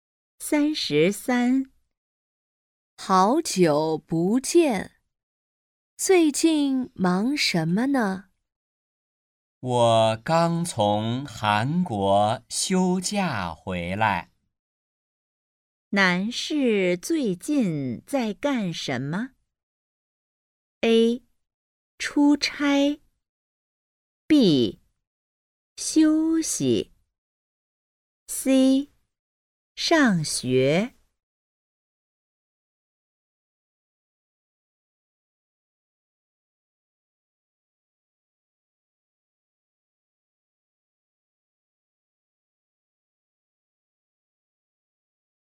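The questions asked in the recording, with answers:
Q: 男士最近在干什么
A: B: 休息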